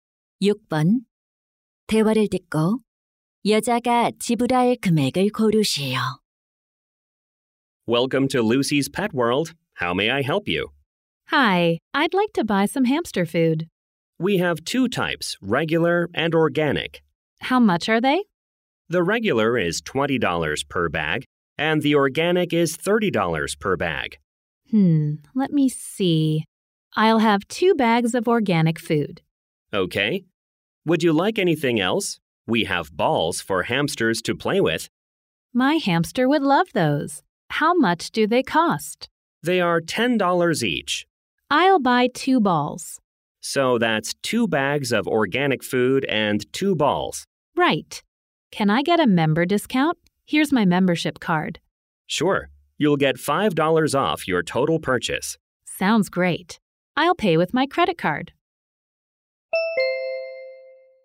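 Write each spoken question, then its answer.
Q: 대화를 듣고 여자가 지불할 금액을 고르시오.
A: $75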